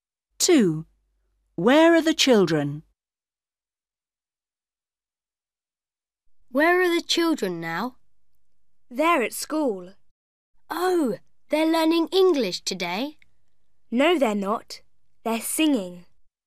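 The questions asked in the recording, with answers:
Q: Where are the children?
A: At school, singing.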